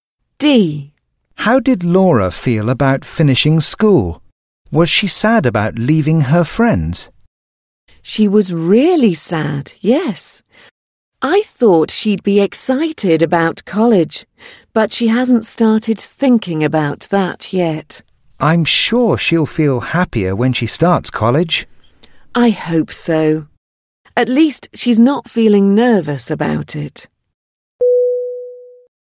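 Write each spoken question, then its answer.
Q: How did Laura feel about finishing school?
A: Sad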